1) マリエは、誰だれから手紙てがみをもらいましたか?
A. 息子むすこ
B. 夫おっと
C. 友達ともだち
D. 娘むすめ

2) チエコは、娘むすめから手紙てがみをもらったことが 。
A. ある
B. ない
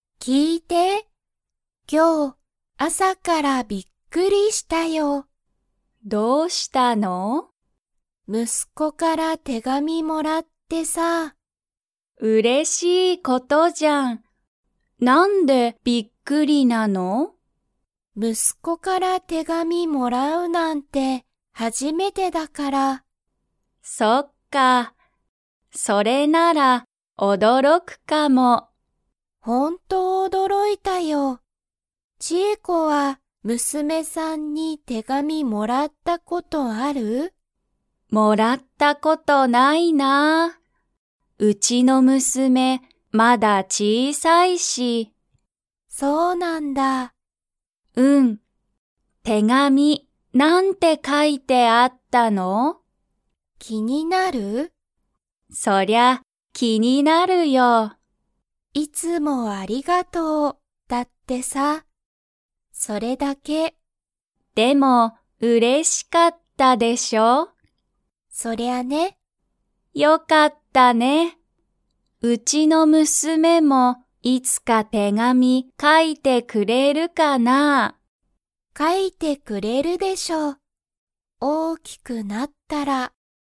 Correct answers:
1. 息子むすこ
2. ない

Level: Level 3

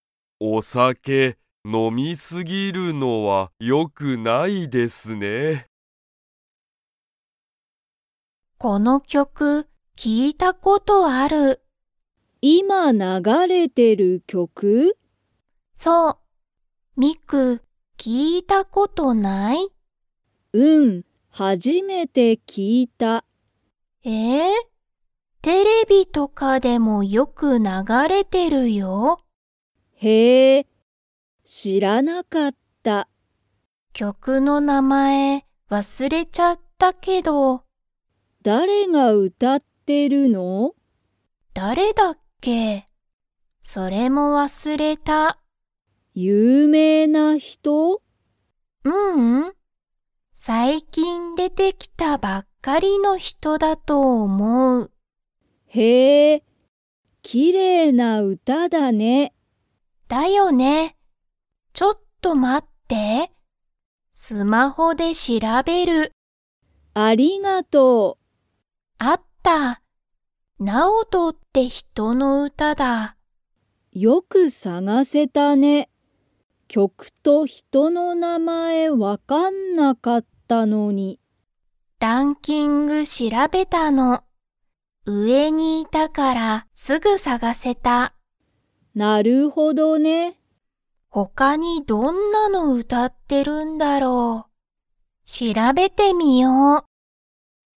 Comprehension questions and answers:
今いま流ながれてる曲きょくは、 とかでもよく流ながれてる。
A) テレビ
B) 会社かいしゃ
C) 学校がっこう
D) スマホ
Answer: テレビ

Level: Level 3

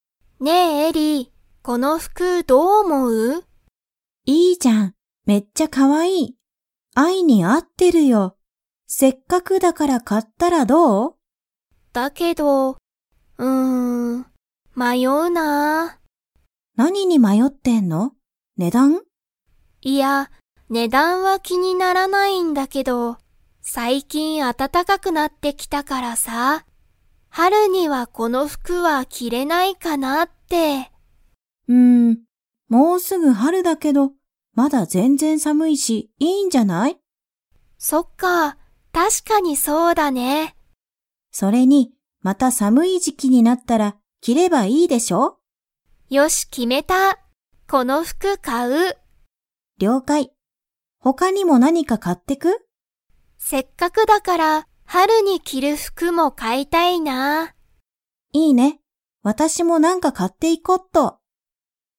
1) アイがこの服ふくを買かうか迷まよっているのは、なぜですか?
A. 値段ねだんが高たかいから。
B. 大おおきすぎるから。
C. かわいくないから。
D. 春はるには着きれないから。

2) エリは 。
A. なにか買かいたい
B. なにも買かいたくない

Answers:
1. 春はるには着きれないから。
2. なにか買かいたい

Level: Level 4

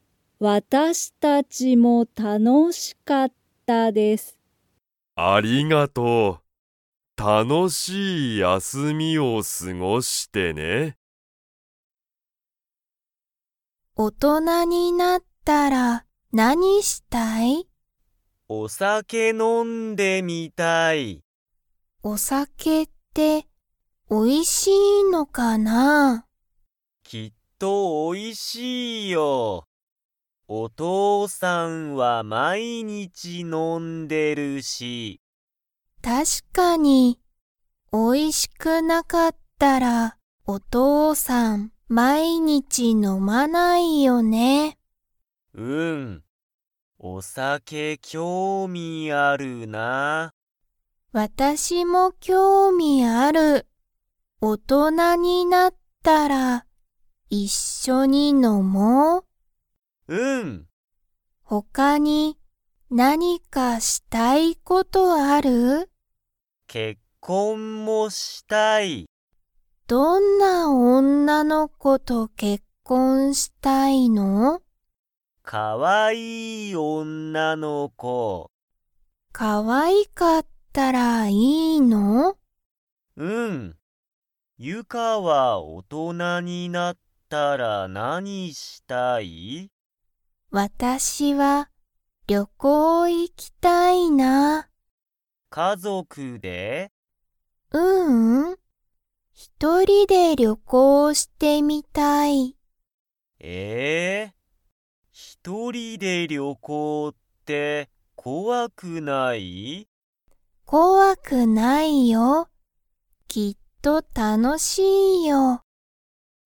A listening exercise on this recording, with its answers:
Comprehension Quiz (Skip if you don't understand the conversation yet)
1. しんじは大人おとなになったら したい。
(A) 結婚けっこん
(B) 料理りょうり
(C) 仕事しごと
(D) 旅行りょこう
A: 結婚けっこん

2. ゆかは大人おとなになったら、家族かぞくで旅行りょこうしてみたいですか?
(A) はい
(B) いいえ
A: いいえ

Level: Level 3

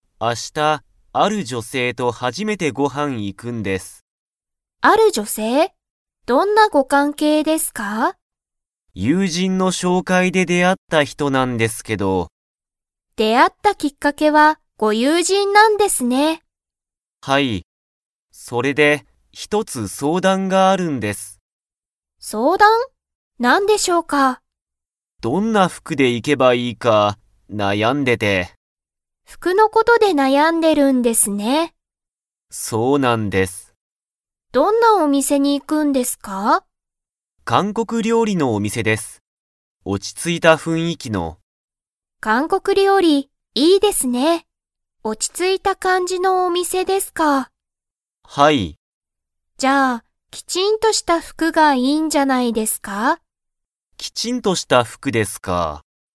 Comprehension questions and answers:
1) 中川なかがわさんは、その女性じょせいと何なにをしますか?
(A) ご飯はんに行いく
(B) 服ふくを買かう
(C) 料理りょうりする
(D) 相談そうだんする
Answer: ご飯はんに行いく

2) 山田やまださんは、 服ふくがいいと思おもっている。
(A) カジュアルな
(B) カジュアルすぎない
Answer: カジュアルすぎない

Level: Level 4

